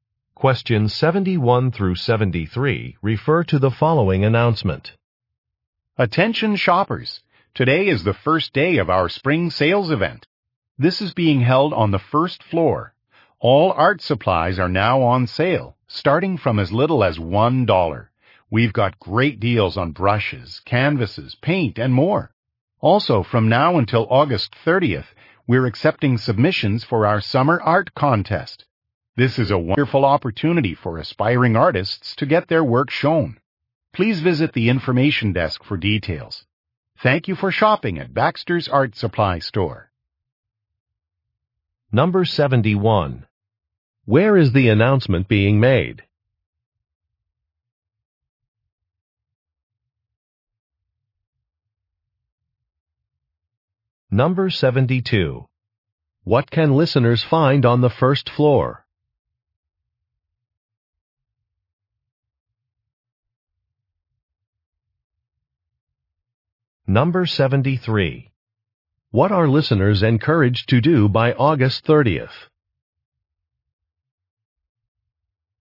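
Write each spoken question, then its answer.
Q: Where is the announcement being made?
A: At Baxter's Art Supply Store

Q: What can listeners find on the first floor?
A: A spring sale on art supplies

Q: What are listeners encouraged to do by August 30th?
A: Submit work to the summer art contest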